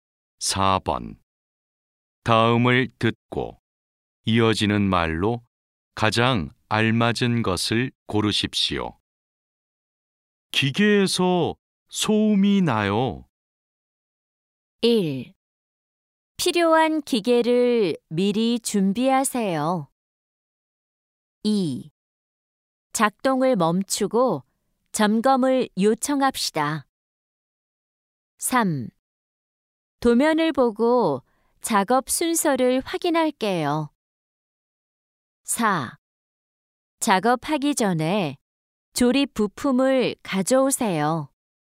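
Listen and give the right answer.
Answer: 2: 작동을 멈추고 점검을 요청합시다.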